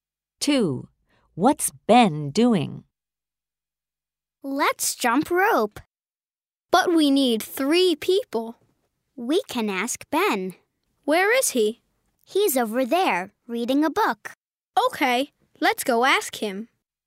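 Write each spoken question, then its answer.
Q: What's Ben doing?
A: Reading a book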